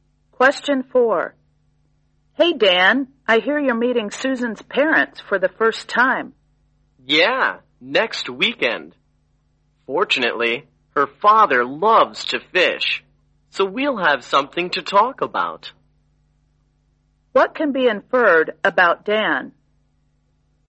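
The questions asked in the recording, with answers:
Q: What can be inferred about Dan?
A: He likes fishing too.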